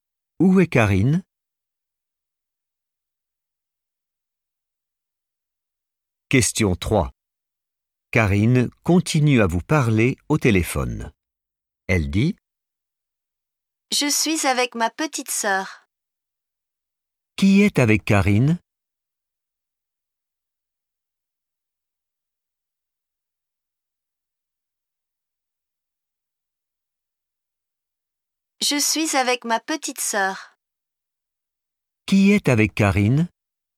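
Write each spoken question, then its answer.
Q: Qui est avec Karine?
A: sa petite sœur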